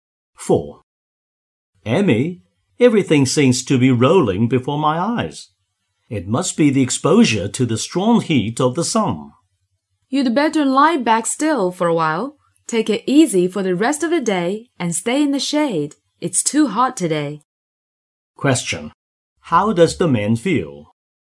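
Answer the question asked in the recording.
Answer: Dizzy from the heat of the sun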